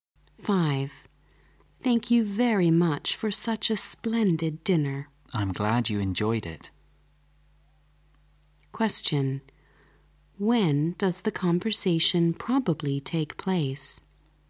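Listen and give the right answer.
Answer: After dinner.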